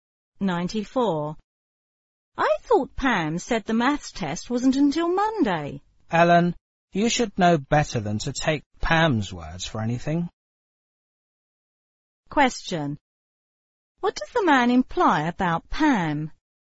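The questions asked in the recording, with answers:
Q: What does the man imply about Pam?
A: Pam is unreliable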